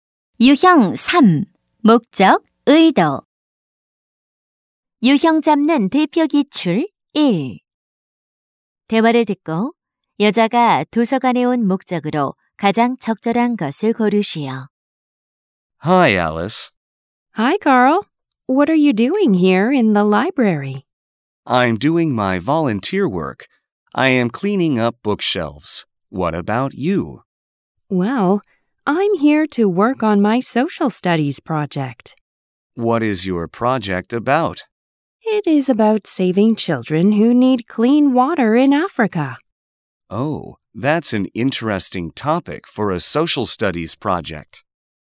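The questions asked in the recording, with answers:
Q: 대화를 듣고 여자가 도서관에 온 목적으로 가장 적절한 것을 고르시오.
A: 사회 과목 프로젝트를 하기 위해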